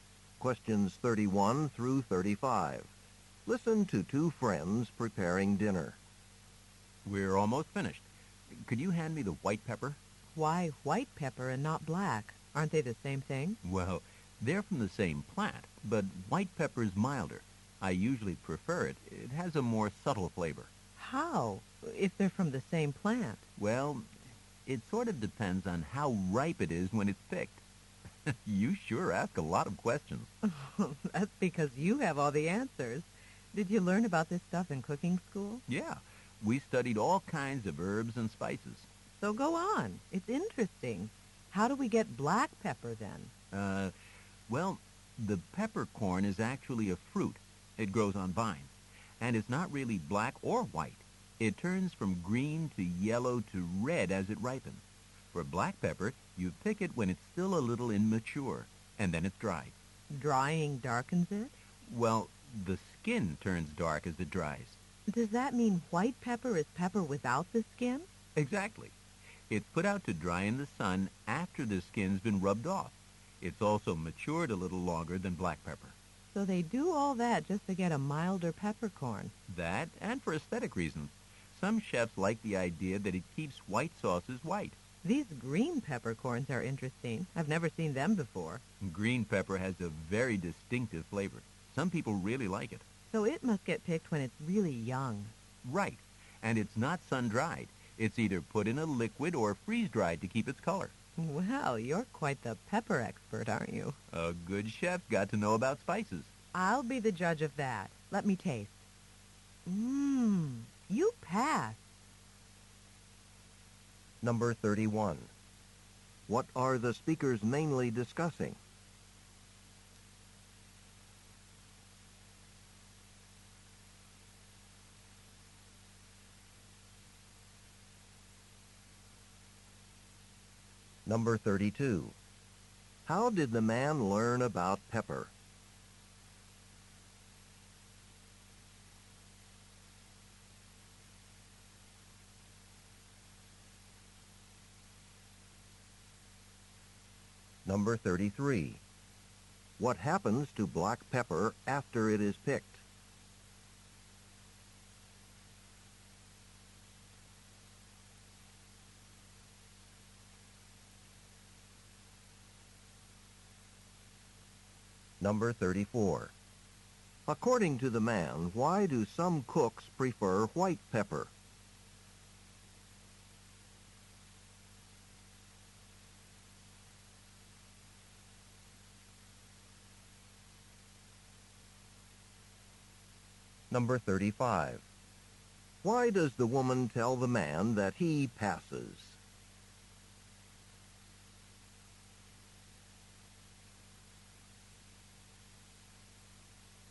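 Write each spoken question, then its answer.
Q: What are the speakers mainly discussing?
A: Different kinds of pepper and how they are produced

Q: How did the man learn about pepper?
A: In cooking school

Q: What happens to black pepper after it is picked?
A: It is dried, which makes its skin turn dark

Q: According to the man, why do some cooks prefer white pepper?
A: It keeps white sauces white

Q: Why does the woman tell the man that he passes?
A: She liked the taste of his food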